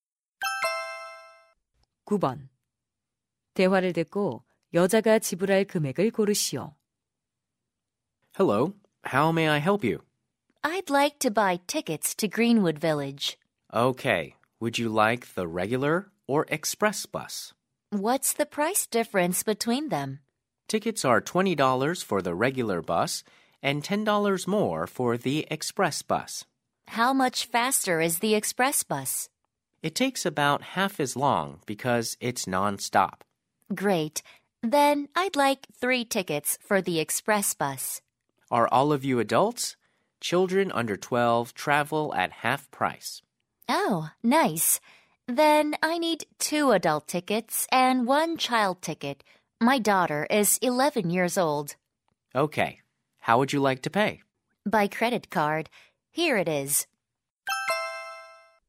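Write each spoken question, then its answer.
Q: 대화를 듣고 여자가 지불할 금액을 고르시오.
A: $75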